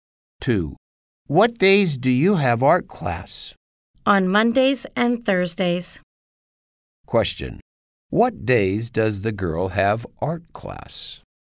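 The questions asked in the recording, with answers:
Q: Question. What days does the girl have art class?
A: Mondays and Thursdays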